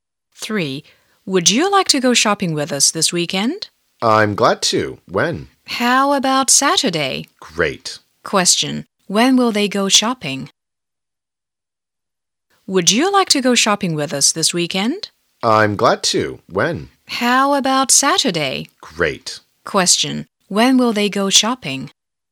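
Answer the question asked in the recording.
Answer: On Saturday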